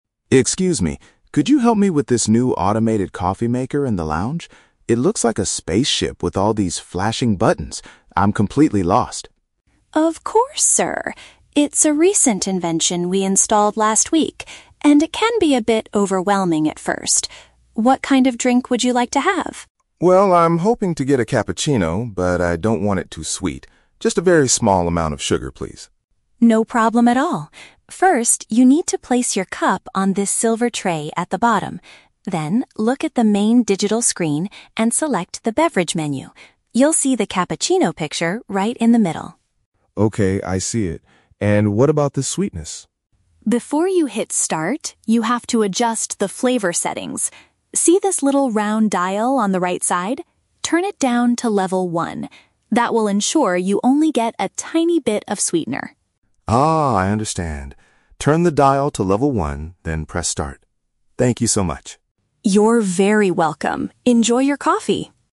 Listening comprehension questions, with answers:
Listen to a conversation between a hotel guest and a staff member. For each question, choose the correct answer (A, B, or C).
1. What is Mark's initial reaction to the new coffee machine?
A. He thinks it makes the best coffee in the hotel.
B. He finds its control panel too complicated to understand.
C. He believes it is broken because the lights are flashing.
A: He finds its control panel too complicated to understand.

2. What exactly does Mark want to drink?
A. A specific type of coffee with minimal sweetness.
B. A traditional black coffee without any sugar.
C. A standard hot chocolate with extra milk.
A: A specific type of coffee with minimal sweetness.

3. How does Elena instruct Mark to control the amount of sugar?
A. By choosing the sweetness level on the main digital screen.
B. By adding sugar packets manually after the drink is ready.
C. By turning a small knob on the side to the lowest setting.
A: By turning a small knob on the side to the lowest setting.

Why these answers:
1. Mark says the machine "looks like a spaceship with all these flashing buttons" and he is "completely lost." Option (B) correctly paraphrases this feeling of confusion. Option (A) is not mentioned. Option (C) is a trap; the buttons are flashing normally, the machine is not broken.
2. Mark asks for a Cappuccino (a specific type of coffee) and says, "Just a very small amount of sugar, please." Option (A) uses "minimal sweetness" as a synonym for "very small amount of sugar". Option (B) is a trap; he wants a Cappuccino, not black coffee. Option (C) is a trap; he doesn't mention hot chocolate.
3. Elena tells him to look at the "little round dial on the right side" and "turn it down to level one." Option (C) uses synonyms ("small knob" for "little round dial", "lowest setting" for "level one"). Option (A) is a trap; the main digital screen is used to select the 'Beverage' menu, not the sugar. Option (B) sounds like a normal way to add sugar in real life, but it is not how this automatic machine works.

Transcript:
Mark: Excuse me. Could you help me with this new automated coffee maker in the lounge? It looks like a spaceship with all these flashing buttons. I'm completely lost.
Elena: Of course, sir. It's a recent invention we installed last week, and it can be a bit overwhelming at first. What kind of drink would you like to have?
Mark: Well, I'm hoping to get a Cappuccino, but I don't want it too sweet. Just a very small amount of sugar, please.
Elena: No problem at all. First, you need to place your cup on this silver tray at the bottom. Then, look at the main digital screen and select the 'Beverage' menu. You'll see the Cappuccino picture right in the middle.
Mark: Okay, I see it. And what about the sweetness?
Elena: Before you hit 'Start', you have to adjust the flavor settings. See this little round dial on the right side? Turn it down to level one. That will ensure you only get a tiny bit of sweetener.
Mark: Ah, I understand. Turn the dial to level one, then press start. Thank you so much!

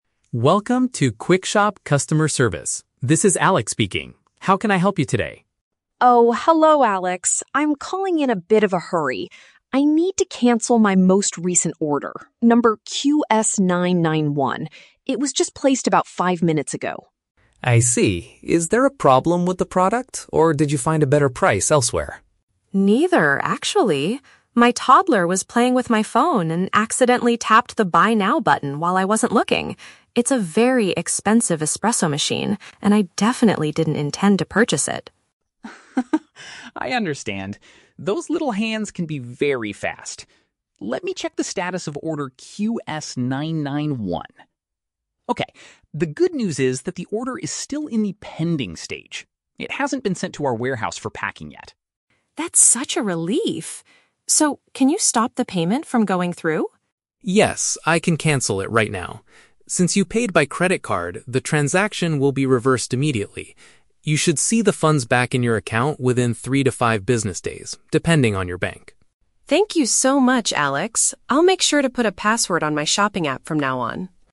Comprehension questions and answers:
Listen to a conversation between a customer and a support agent. Choose the best answer (A, B, or C) for each question.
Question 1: Why is the customer calling the support center in a hurry?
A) She wants to change the delivery address for her espresso machine.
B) She needs to stop an accidental purchase made by a small child.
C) She found a cheaper coffee maker on another shopping website.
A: She needs to stop an accidental purchase made by a small child.

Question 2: What is the current status of the order in the system?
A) It is currently being packed by the staff at the warehouse.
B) It has already been picked up by the delivery driver.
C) It is still waiting for official processing and hasn't moved yet.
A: It is still waiting for official processing and hasn't moved yet.

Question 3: What does the agent say about the refund process?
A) The customer will receive her money back in less than an hour.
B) It might take a few days for the bank to show the returned money.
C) The customer must call her bank personally to get the refund.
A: It might take a few days for the bank to show the returned money.

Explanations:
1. The customer explains, "My toddler was playing with my phone and accidentally tapped the 'Buy Now' button." Option B paraphrases "toddler" as "small child" and "accidentally tapped" as "accidental purchase." Why the trap is wrong: Option (A) is not mentioned. Option (C) is a trap; the agent asks if she found a "better price," but she says "Neither, actually!"
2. The agent says the order is in the "Pending" stage and "hasn't been sent to our warehouse... yet." Option C uses "waiting for official processing" as a synonym for "Pending." Why the trap is wrong: Option (A) and (B) are stages that would make cancellation much harder, but the agent confirms they haven't happened yet.
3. The agent states, "You should see the funds back in your account within three to five business days." Option B paraphrases this timeframe as "a few days." Why the trap is wrong: Option (A) is a trap; the cancellation is "right now," but the refund takes longer. Option (C) is not mentioned; the agent says the transaction will be reversed automatically.

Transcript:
Support: Welcome to QuickShop Customer Service. This is Alex speaking. How can I help you today?
Customer: Oh, hello Alex! I'm calling in a bit of a hurry. I need to cancel my most recent order, number QS-991. It was just placed about five minutes ago.
Support: I see. Is there a problem with the product, or did you find a better price elsewhere?
Customer: Neither, actually! My toddler was playing with my phone and accidentally tapped the "Buy Now" button while I wasn't looking. It's a very expensive espresso machine, and I definitely didn't intend to purchase it!
Support: Haha, I understand. Those little hands can be very fast! Let me check the status of order QS-991... Okay, the good news is that the order is still in the "Pending" stage. It hasn't been sent to our warehouse for packing yet.
Customer: That's such a relief! So, can you stop the payment from going through?
Support: Yes, I can cancel it right now. Since you paid by credit card, the transaction will be reversed immediately. You should see the funds back in your account within three to five business days, depending on your bank.

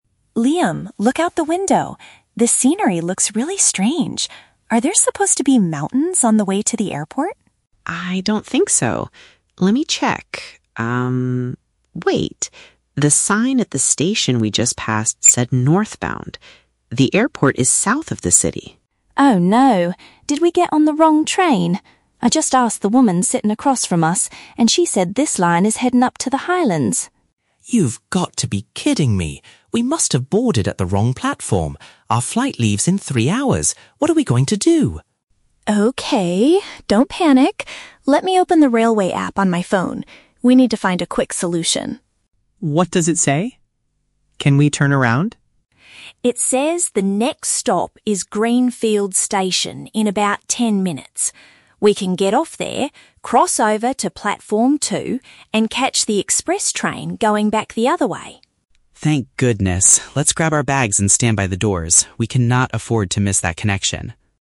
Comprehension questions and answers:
Listen to the conversation between two tourists on a train. Choose the correct answer (A, B, or C) for each question.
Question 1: How do the tourists first realize they made a mistake?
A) They checked the train schedule on their mobile app.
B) They noticed the landscape outside was incorrect.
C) A ticket inspector told them they were going the wrong way.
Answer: They noticed the landscape outside was incorrect.

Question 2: What is their main concern right now?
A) They might be late for their upcoming flight.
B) They do not have enough money for new train tickets.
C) They missed the stop for the highlands.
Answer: They might be late for their upcoming flight.

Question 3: What do they plan to do next?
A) Ask the woman across from them for directions to Greenfield.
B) Exit the train soon and travel in the opposite direction.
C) Wait for the express train to take them to the mountains.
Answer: Exit the train soon and travel in the opposite direction.

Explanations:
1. Emma says the "scenery looks really strange" and mentions seeing "mountains." Scenery is a synonym for landscape. They realized the mistake by looking outside. Why the trap is wrong: Option (A) is a trap. The audio mentions the "railway app," but Emma uses it after they realize they are lost to find a solution. Option (C) is a trap because Emma asked a "woman sitting across from us," not a ticket inspector/conductor.
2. Liam is worried and says, "Our flight leaves in three hours!" This shows their main problem is that they are in a hurry to get to the airport. Why the trap is wrong: Option (C) is a trap. The audio mentions the "highlands," but that is where the train is going, not where they want to go. Option (B) is a plausible travel worry, but they never talk about money or buying new tickets.
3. Emma suggests they "get off there" (at the next stop) and "catch the express train going back the other way." Going "back the other way" means traveling in the opposite direction. Why the trap is wrong: Option (A) is a trap. Emma already spoke to the woman earlier, she isn't planning to ask her for more directions now. Option (C) is a trap because they want to go to the airport, not the mountains.

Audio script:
Emma: Liam, look out the window. This scenery looks really strange. Are there supposed to be mountains on the way to the airport?
Liam: I don't think so. Let me check... The sign at the station we just passed said "Northbound". The airport is south of the city!
Emma: Oh no. Did we get on the wrong train? I just asked the woman sitting across from us, and she said this line is heading up to the highlands!
Liam: You've got to be kidding me! We must have boarded at the wrong platform. Our flight leaves in three hours! What are we going to do?
Emma: Okay, don't panic. Let me open the railway app on my phone. We need to find a quick solution.
Liam: What does it say? Can we turn around?
Emma: It says the next stop is Greenfield Station in about ten minutes. We can get off there, cross over to platform 2, and catch the express train going back the other way.
Liam: Thank goodness. Let's grab our bags and stand by the doors. We cannot afford to miss that connection!

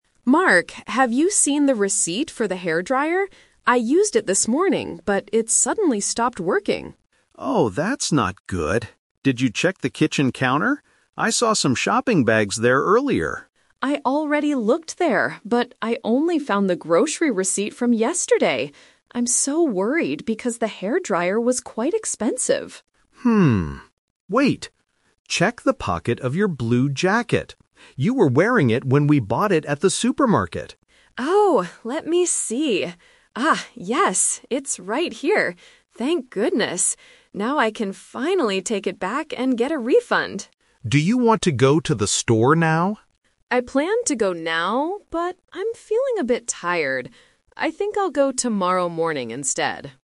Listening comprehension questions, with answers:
Listen to the conversation between a husband and wife. Read the questions and choose the best answer (A, B, or C).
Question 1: What is the problem with the hairdryer?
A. It is the wrong color.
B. It does not work anymore.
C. It was too cheap.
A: It does not work anymore.

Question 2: Where did the woman find the receipt?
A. On the kitchen counter.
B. Inside a shopping bag.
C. In her jacket pocket.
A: In her jacket pocket.

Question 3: When will the woman return the hairdryer?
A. Right now.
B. Tomorrow morning.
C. Yesterday afternoon.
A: Tomorrow morning.

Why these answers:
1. The woman says the hairdryer "suddenly stopped working." Why the trap is wrong: Option (C) is a trap because she mentions the word "expensive," not "cheap."
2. After checking other places, she finds it in her "blue jacket" pocket. Why the trap is wrong: Option (A) is a trap. The husband suggested the "kitchen counter," but the woman said she "already looked there" and only found a different receipt.
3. This is the "Twist." She says: "I planned to go now, but... I'll go tomorrow morning instead." Why the trap is wrong: Option (A) is a trap. It was her original plan, but she changed her decision because she felt tired.

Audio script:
Wife: Mark, have you seen the receipt for the hairdryer? I used it this morning, but it suddenly stopped working.
Husband: Oh, that's not good! Did you check the kitchen counter? I saw some shopping bags there earlier.
Wife: I already looked there, but I only found the grocery receipt from yesterday. I'm so worried because the hairdryer was quite expensive.
Husband: Hmm... Wait! Check the pocket of your blue jacket. You were wearing it when we bought it at the supermarket.
Wife: Oh, let me see... Ah, yes! It's right here. Thank goodness! Now I can finally take it back and get a refund.
Husband: Do you want to go to the store now?
Wife: I planned to go now, but I'm feeling a bit tired. I think I'll go tomorrow morning instead.

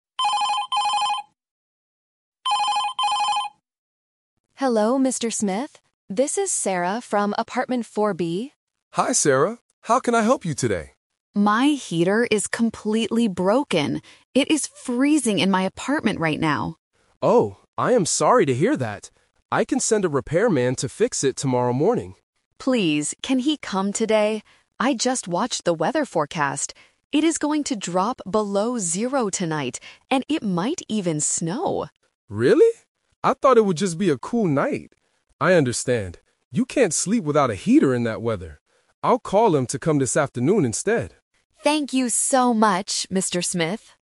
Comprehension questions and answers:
Listen to the telephone conversation and select the best option (A, B, or C).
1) Why is Sarah calling Mr. Smith?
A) She wants to move to a new apartment.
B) Her heater is broken.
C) She forgot her apartment key.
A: Her heater is broken.

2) What is the weather forecast for tonight?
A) It will drop below zero and might snow.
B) It will just be a cool and cloudy night.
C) It will rain heavily all night.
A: It will drop below zero and might snow.

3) When will the repairman come to fix the heater?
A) Tomorrow morning.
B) Tomorrow afternoon.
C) This afternoon.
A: This afternoon.

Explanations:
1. Sarah explicitly states at the beginning, "My heater is completely broken." Options (A) and (C) are plausible reasons to call a landlord, but they are never mentioned in the audio.
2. Sarah tells her landlord: "It is going to drop below zero tonight, and it might even snow!" Option (B) is the trap because it is what Mr. Smith thought the weather would be ("I thought it would just be a cool night"). Option (C) is not mentioned.
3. Because of the freezing weather, Mr. Smith changes the plan (The Twist) and says, "I will call him to come this afternoon instead." Option (A) is the trap because it was Mr. Smith's initial plan before he knew about the snow. Option (B) is not mentioned.

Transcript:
Sarah: Hello, Mr. Smith? This is Sarah from Apartment 4(B).
Mr. Smith: Hi Sarah. How can I help you today?
Sarah: My heater is completely broken. It is freezing in my apartment right now!
Mr. Smith: Oh, I am sorry to hear that. I can send a repairman to fix it tomorrow morning.
Sarah: Please, can he come today? I just watched the weather forecast. It is going to drop below zero tonight, and it might even snow!
Mr. Smith: Really? I thought it would just be a cool night. I understand. You can't sleep without a heater in that weather.

